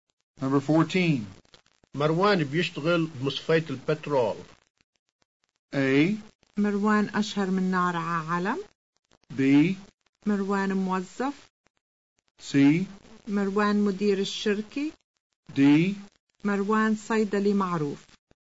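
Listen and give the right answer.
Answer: B: مروان موظف.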